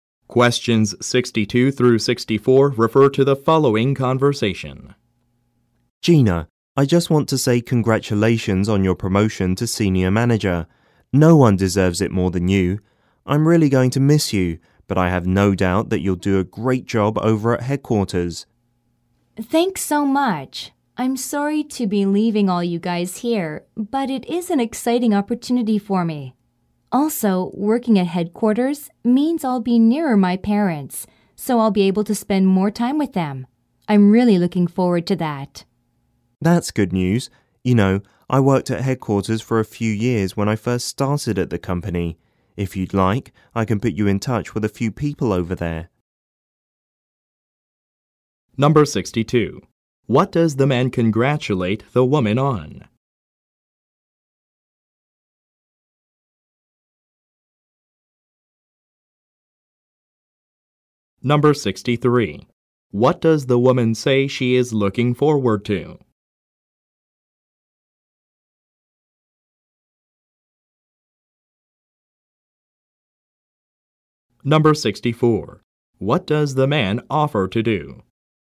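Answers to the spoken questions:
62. Her promotion to senior manager
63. Spending more time with her parents
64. Put her in touch with people at headquarters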